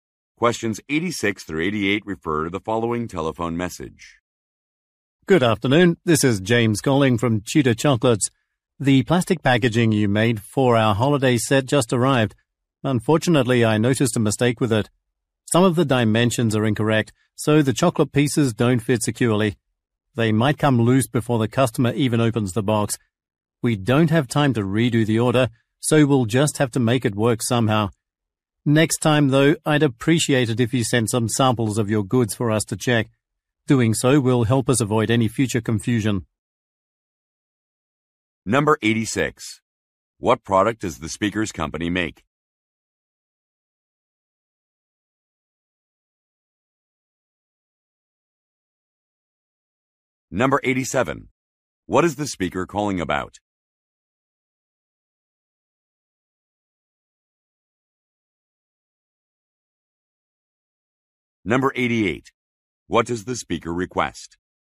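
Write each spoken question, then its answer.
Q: What product does the speaker's company make?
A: Chocolates

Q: What is the speaker calling about?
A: Packaging with incorrect dimensions

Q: What does the speaker request?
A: That samples be sent for checking next time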